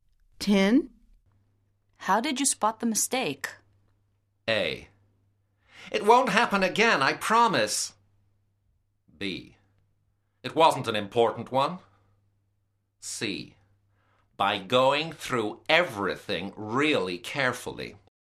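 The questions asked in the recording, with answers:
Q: How did you spot the mistake?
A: C: By going through everything really carefully.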